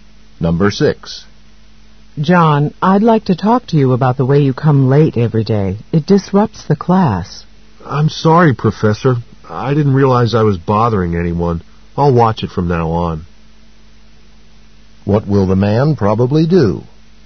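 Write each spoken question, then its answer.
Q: What will the man probably do?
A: Come to class on time.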